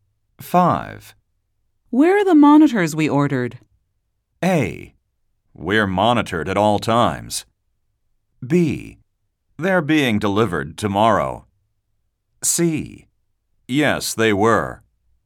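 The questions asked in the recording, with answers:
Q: Where are the monitors we ordered?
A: B: They're being delivered tomorrow.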